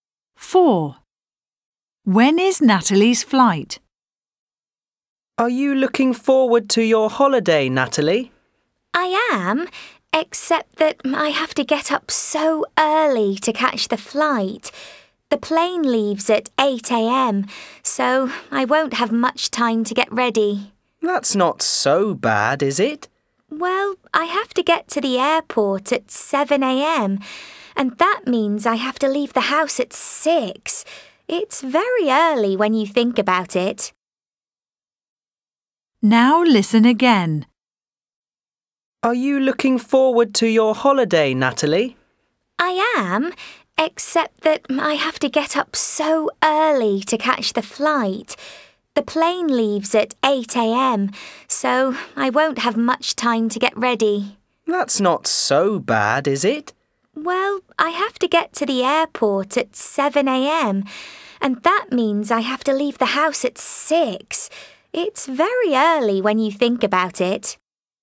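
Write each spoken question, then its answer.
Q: When is Natalie's flight?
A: 8 a.m.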